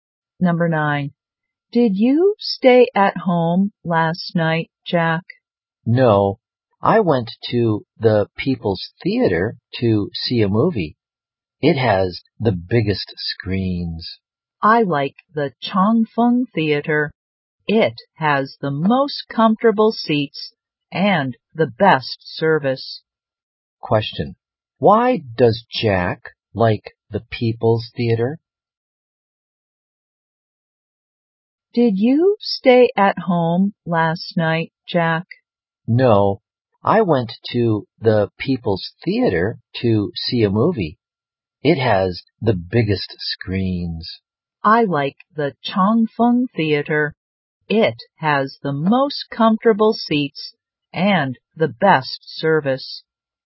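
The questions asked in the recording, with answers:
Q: Why does Jack like the People's Theater?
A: It has the biggest screens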